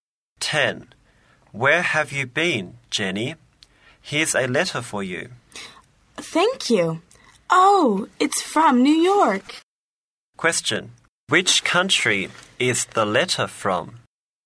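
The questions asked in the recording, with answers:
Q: Which country is the letter from?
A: The USA (America)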